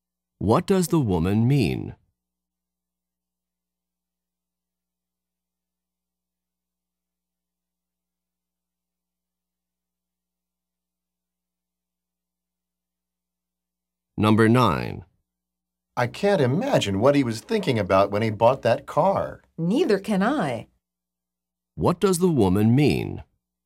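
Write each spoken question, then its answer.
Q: What does the woman mean?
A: She also can't understand why he bought that car.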